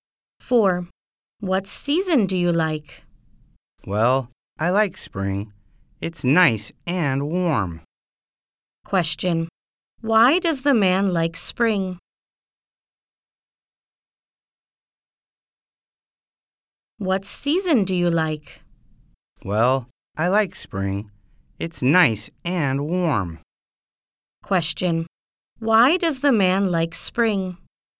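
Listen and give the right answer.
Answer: It's nice and warm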